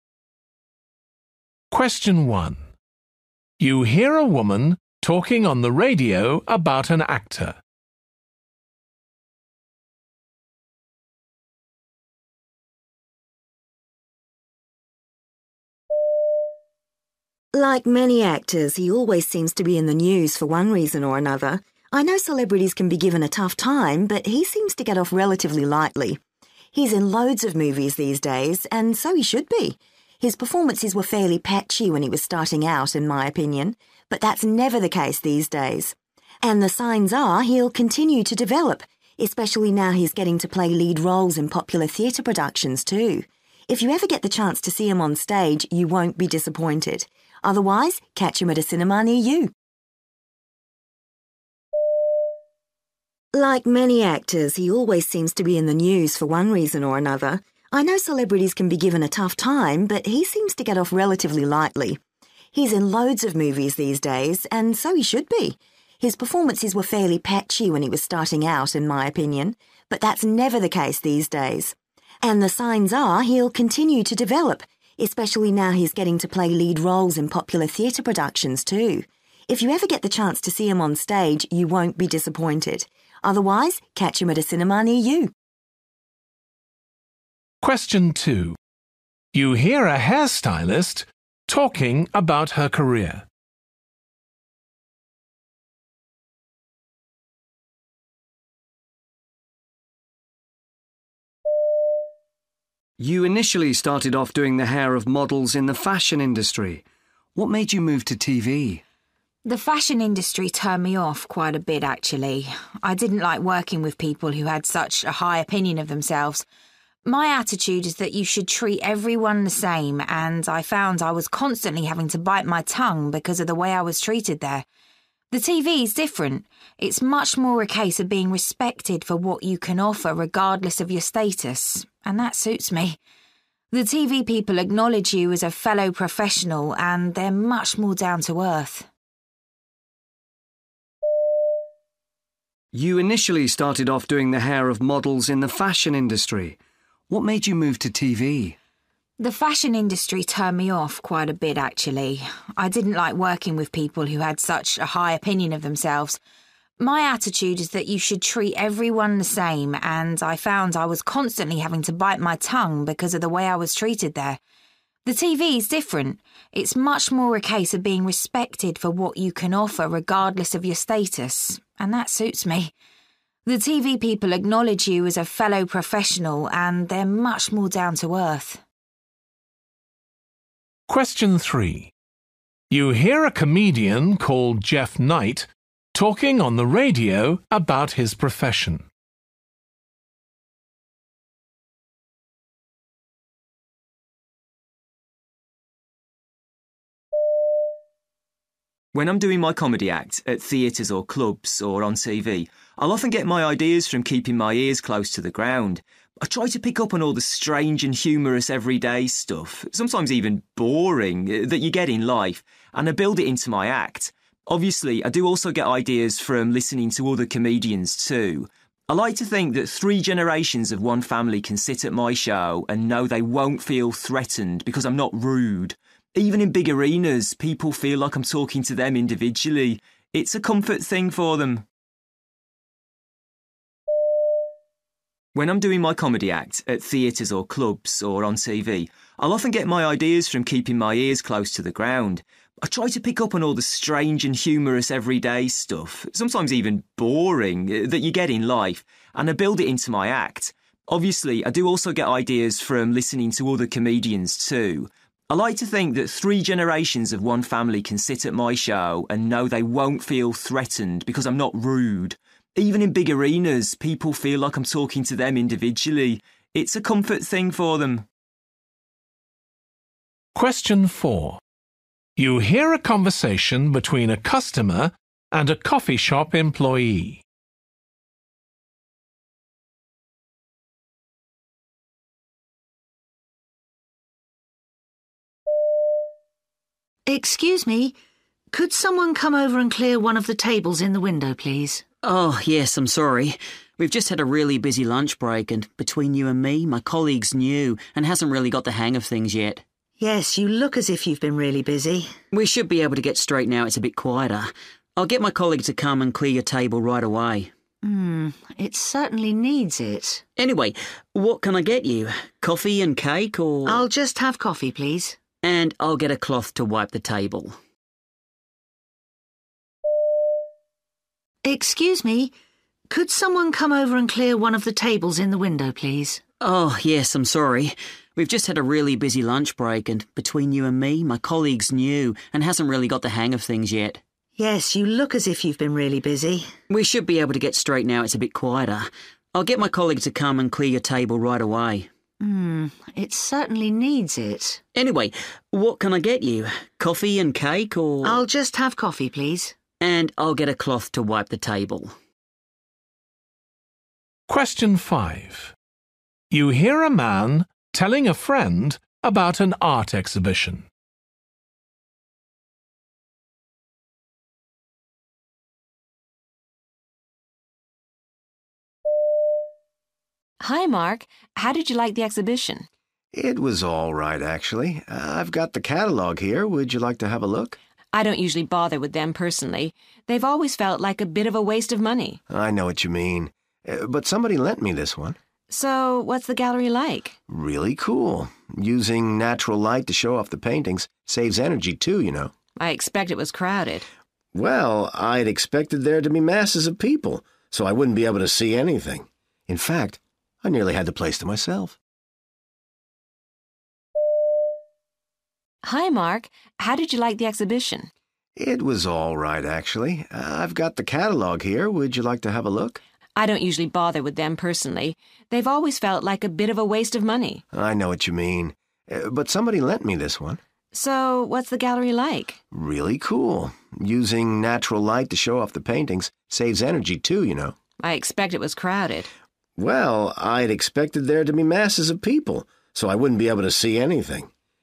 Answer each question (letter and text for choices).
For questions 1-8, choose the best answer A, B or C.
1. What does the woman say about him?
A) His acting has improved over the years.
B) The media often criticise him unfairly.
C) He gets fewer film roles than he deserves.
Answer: A) His acting has improved over the years.

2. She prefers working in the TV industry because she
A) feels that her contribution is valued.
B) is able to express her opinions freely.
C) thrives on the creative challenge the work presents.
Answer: A) feels that her contribution is valued.

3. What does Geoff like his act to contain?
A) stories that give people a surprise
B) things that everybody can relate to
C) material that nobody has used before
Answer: B) things that everybody can relate to

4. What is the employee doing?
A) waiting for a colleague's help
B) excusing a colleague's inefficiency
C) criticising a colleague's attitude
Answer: B) excusing a colleague's inefficiency

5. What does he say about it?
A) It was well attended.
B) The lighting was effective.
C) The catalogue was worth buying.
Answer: B) The lighting was effective.

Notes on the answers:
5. Really cool, using natural light to show off the paintings – saves energy too, you know ...

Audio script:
1
Woman: Like many actors, he always seems to be in the news for one reason or another. I know celebrities can be given a tough time, but he seems to get off relatively lightly. He's in loads of movies these days – and so he should be. His performances were fairly patchy when he was starting out, it my opinion, but that's never the case these days. And the signs are he'll continue to develop, especially now he's getting to play lead roles in popular theatre productions, too. If you ever get the chance to see him on stage, you won't be disappointed. Otherwise, catch him at a cinema near you!
2
Man: You initially started off doing the hair of models in the fashion industry. What made you move to TV?
Woman: The fashion industry turned me off quite a bit actually. I didn't like working with people who had such a high opinion of themselves. My attitude is that you should treat everyone the same and I found I was constantly having to bite my tongue because of the way I was treated there. The TV's different: it's much more a case of being respected for what you can offer regardless of your status ... and that suits me. The TV people acknowledge you as a fellow professional and they're much more down-to-earth.
3
Man: When I'm doing my comedy act, at theatres or clubs or on TV, I'll often get my ideas from keeping my ears close to the ground. I try to pick up on all the strange and humorous everyday stuff, sometimes even boring ... that you get in life ... and I build it into my act. Obviously I do also get ideas from listening to other comedians too. I like to think that three generations of one family can sit at my show and know they won't feel threatened, because I'm not rude. Even in big arenas people feel like I'm talking to them individually. It's a comfort thing for them.
4
Woman: Excuse me. Could someone come over and clear one of the tables in the window please?
Man: Oh yes. I'm sorry. We've just had a really busy lunch break and, between you and me, my colleague's new and hasn't really got the hang of things yet.
Woman: Yes, you look as if you've been really busy.
Man: We should be able to get straight now it's a bit quieter. I'll get my colleague to come and clear your table right away.
Woman: Hmmm ... It certainly needs it!
Man: Anyway, what can I get you? Coffee and cake or ...
Woman: I'll just have coffee please.
Man: And I'll get a cloth to wipe the table.
5
Woman: Hi Mark, how did you like the exhibition?
Man: It was alright, actually. I've got the catalogue here. Would you like to have a look?
Woman: I don't usually bother with them, personally. They've always felt like a bit of a waste of money.
Man: I know what you mean, but somebody lent me this one.
Woman: So ... what's the gallery like?
Man: Really cool, using natural light to show off the paintings – saves energy too, you know ...
Woman: I expect it was crowded.
Man: Well, I'd expected there to be masses of people, so I wouldn't be able to see anything. In fact, I nearly had the place to myself.
6
Man: Hello.